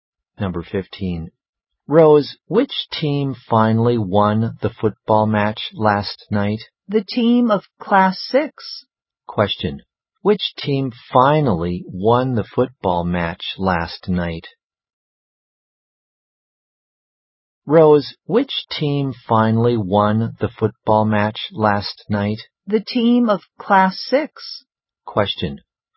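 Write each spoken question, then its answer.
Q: Which team finally won the football match last night?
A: The team of Class 6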